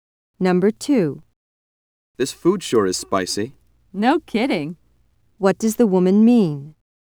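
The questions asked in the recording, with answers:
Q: What does the woman mean?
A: She agrees the food is very spicy.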